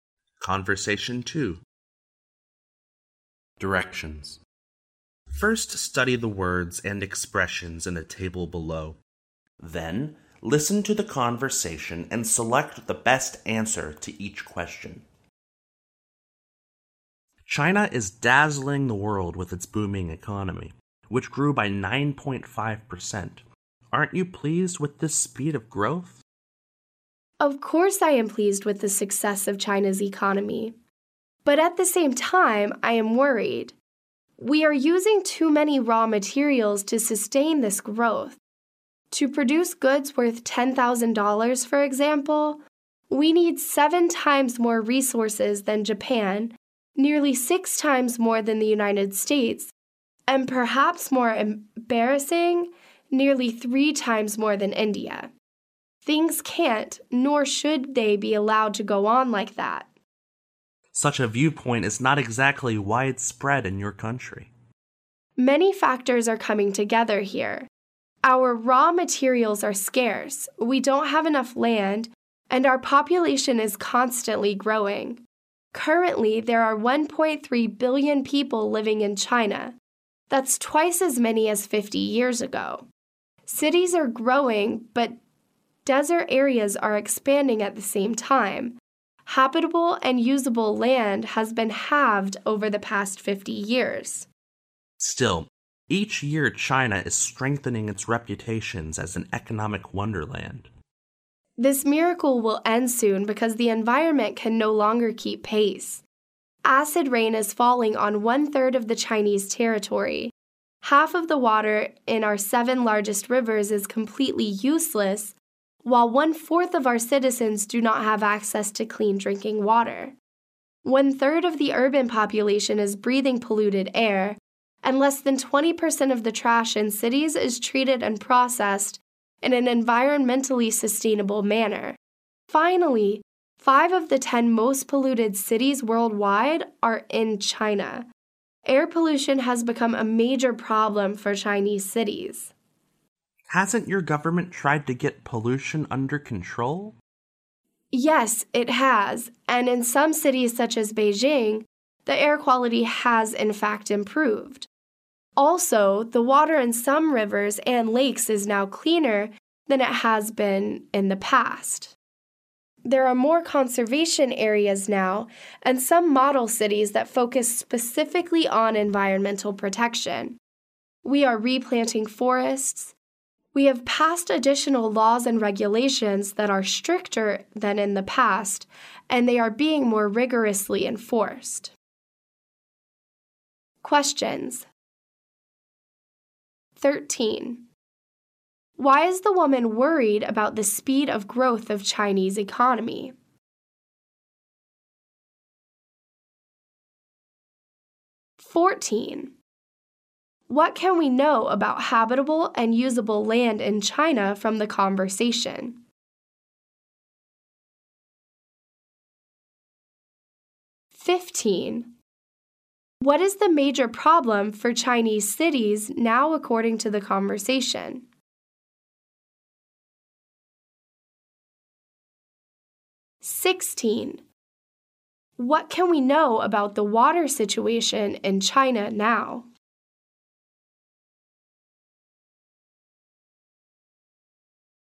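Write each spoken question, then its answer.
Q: Why is the woman worried about the speed of growth of Chinese economy?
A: Too many raw materials are used to sustain the growth.

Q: What can we know about habitable and usable land in China from the conversation?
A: It has been halved over the past 50 years.

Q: What is the major problem for Chinese cities now according to the conversation?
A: Air pollution.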